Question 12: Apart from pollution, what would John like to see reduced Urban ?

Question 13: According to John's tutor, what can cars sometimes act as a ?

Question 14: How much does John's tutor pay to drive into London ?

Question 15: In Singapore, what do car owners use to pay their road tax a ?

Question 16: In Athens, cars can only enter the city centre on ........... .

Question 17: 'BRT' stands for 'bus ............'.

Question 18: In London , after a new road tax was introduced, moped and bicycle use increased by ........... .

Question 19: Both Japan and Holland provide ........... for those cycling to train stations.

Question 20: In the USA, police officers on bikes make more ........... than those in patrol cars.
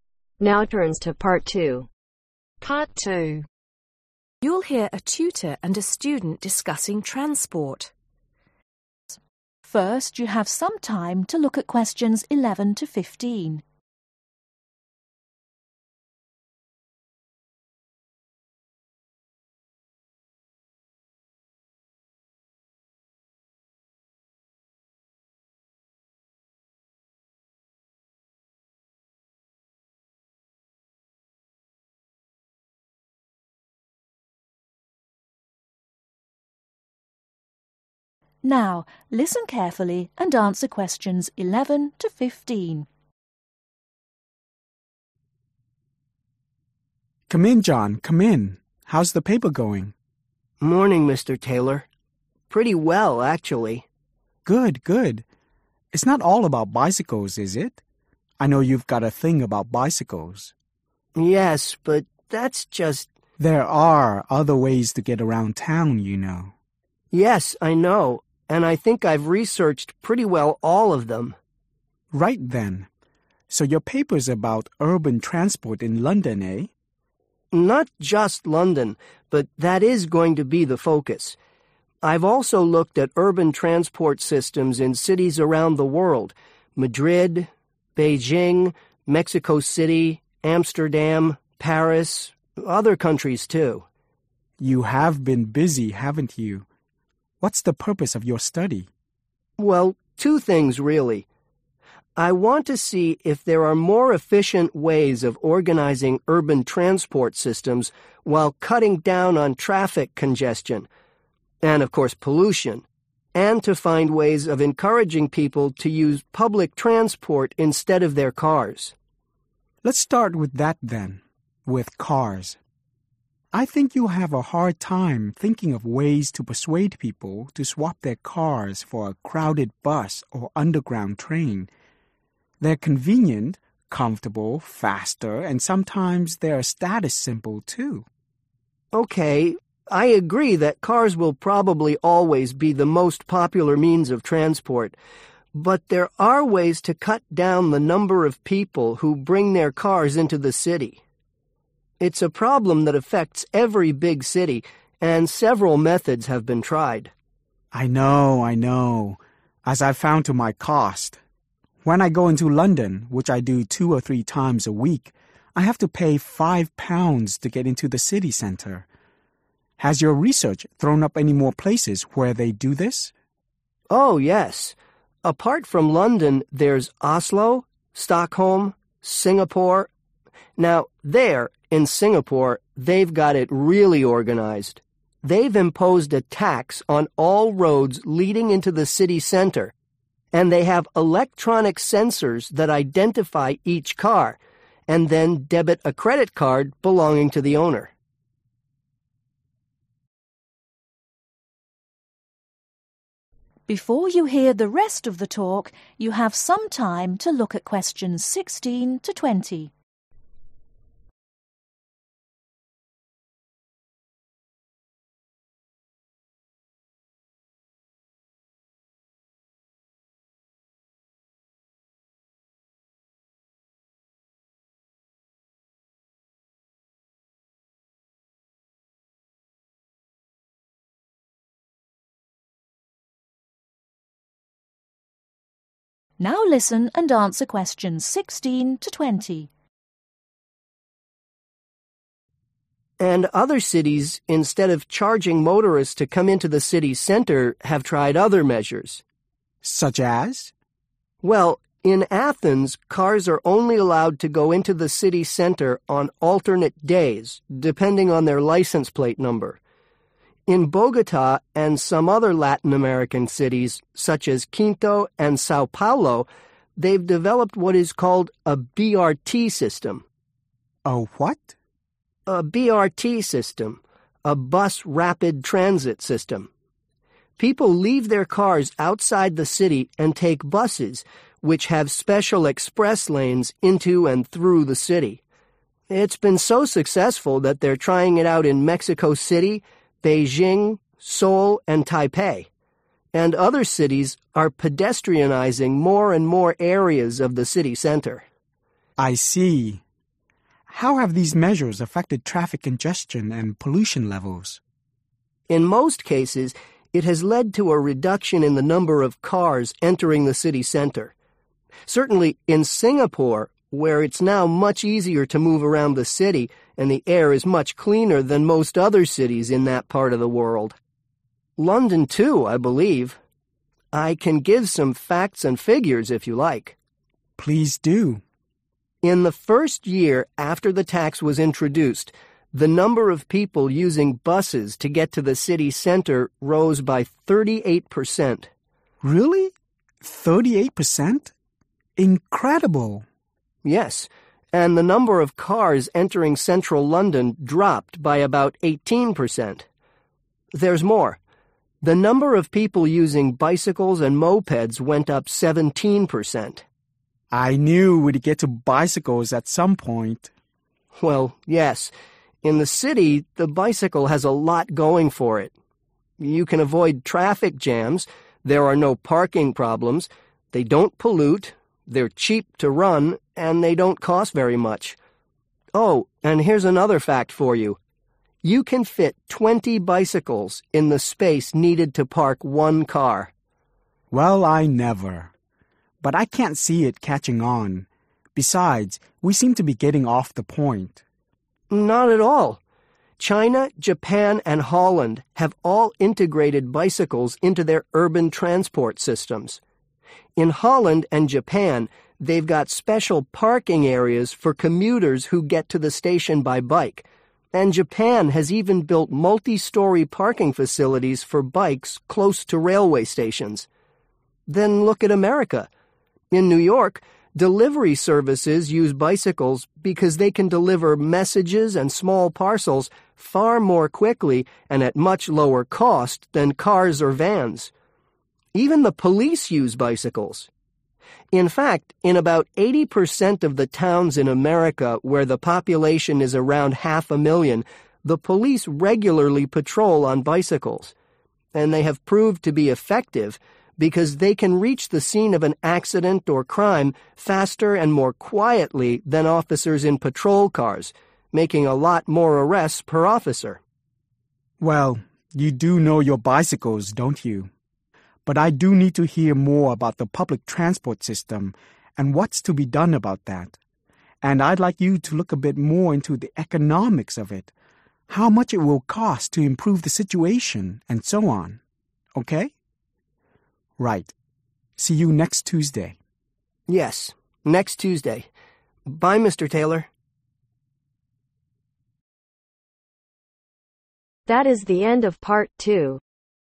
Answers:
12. traffic congestion
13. status symbol
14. five pounds
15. credit card
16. alternate days
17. rapid transit
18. 17%
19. parking facilities
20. arrests